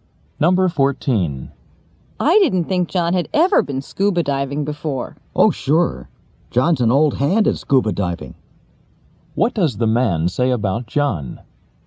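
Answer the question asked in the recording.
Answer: John has a lot of experience with scuba diving.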